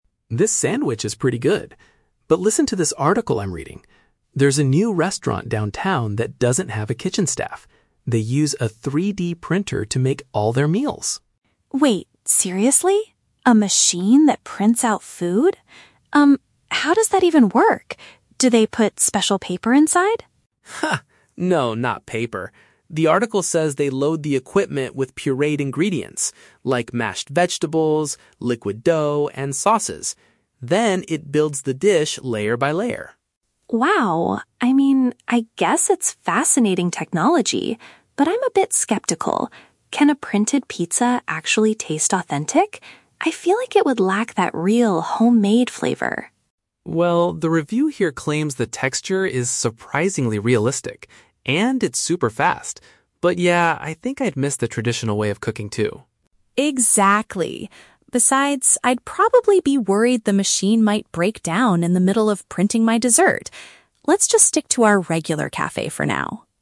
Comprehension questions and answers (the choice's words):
Listen to a conversation between two friends having lunch and choose the correct answer (A, B, or C) for each question.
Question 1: What is unique about the new restaurant mentioned in the article?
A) It uses automated equipment to prepare the dishes.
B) It specializes in traditional, homemade meals.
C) It only accepts reservations through a mobile app.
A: It uses automated equipment to prepare the dishes.

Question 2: According to Alex, what goes into the machine to create the food?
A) Special edible paper.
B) Crushed and liquid-form ingredients.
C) Frozen pre-packaged meals.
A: Crushed and liquid-form ingredients.

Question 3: How does Jamie feel about the printed food?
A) She is eager to try their printed desserts immediately.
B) She doubts it will have the same quality as regular cooking.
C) She thinks the meals will be too expensive for her budget.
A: She doubts it will have the same quality as regular cooking.

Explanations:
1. Alex mentions that the restaurant uses a "3D printer" (which is automated equipment) to make all their meals.
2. Alex explains that they load the machine with "pureed ingredients" like "mashed vegetables" and "liquid dough," which means crushed and liquid-form foods.
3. Jamie says she is "skeptical" and feels the food would "lack that real, homemade flavor." This means she doubts its quality compared to regular cooking.

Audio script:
Alex: This sandwich is pretty good, but listen to this article I'm reading. There's a new restaurant downtown that doesn't have a kitchen staff. They use a 3D printer to make all their meals!
Jamie: Wait, seriously? A machine that prints out food? Um, how does that even work? Do they put special paper inside?
No, not paper. The article says they load the equipment with pureed ingredients—like mashed vegetables, liquid dough, and sauces. Then, it builds the dish layer by layer.
Jamie: Wow... I mean, I guess it's fascinating technology, but I'm a bit skeptical. Can a printed pizza actually taste authentic? I feel like it would lack that real, homemade flavor.
Alex: Well, the review here claims the texture is surprisingly realistic. And it's super fast. But yeah, I think I'd miss the traditional way of cooking, too.
Jamie: Exactly. Besides, I'd probably be worried the machine might break down in the middle of printing my dessert! Let's just stick to our regular cafe for now.